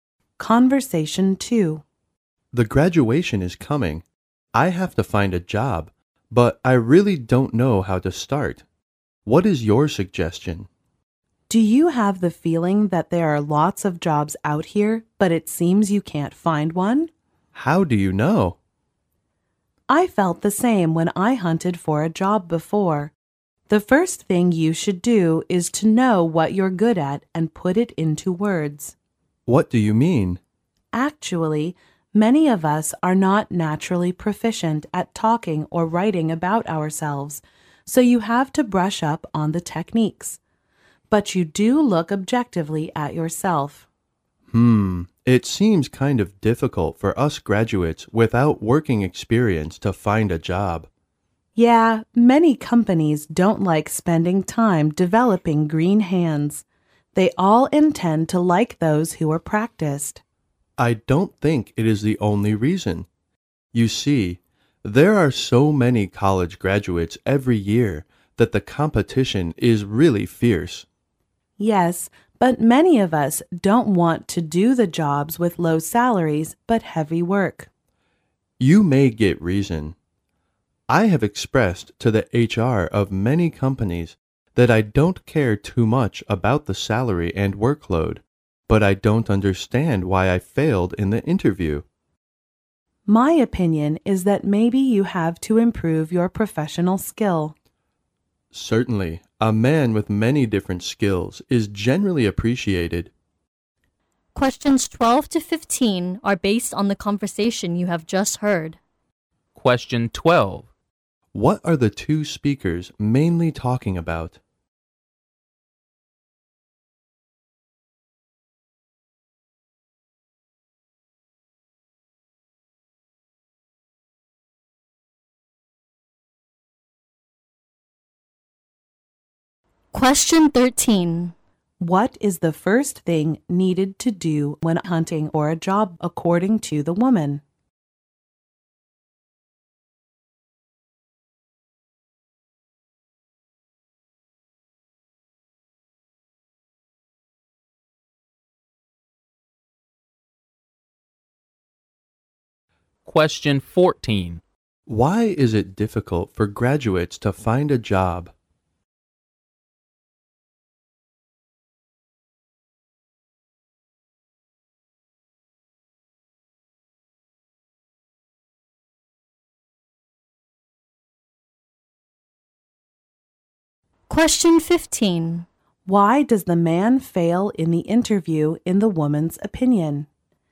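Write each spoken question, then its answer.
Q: What are the two speakers mainly talking about?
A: Finding a job after graduation

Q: What is the first thing needed to do when hunting for a job, according to the woman?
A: Know what you're good at and put it into words

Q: Why is it difficult for graduates to find a job?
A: They lack work experience and competition is fierce

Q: Why does the man fail in the interview in the woman's opinion?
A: He needs to improve his professional skills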